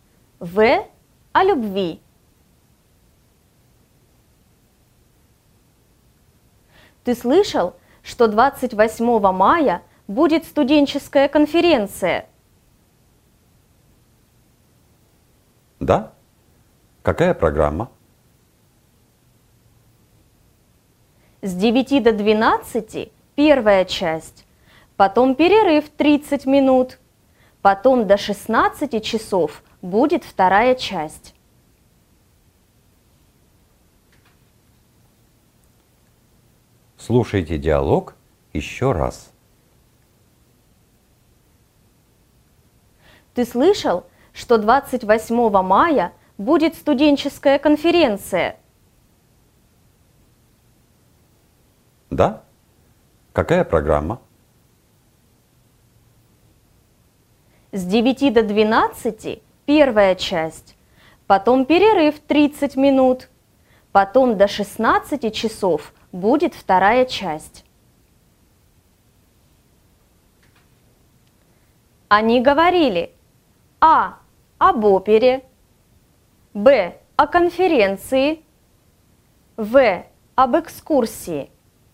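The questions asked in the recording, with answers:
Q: Они говорили: а. об опере, б.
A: Б: о конференции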